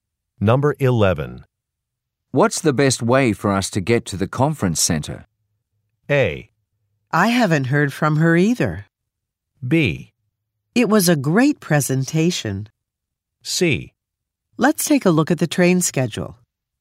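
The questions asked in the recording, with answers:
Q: What's the best way for us to get to the conference center?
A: C: Let's take a look at the train schedule.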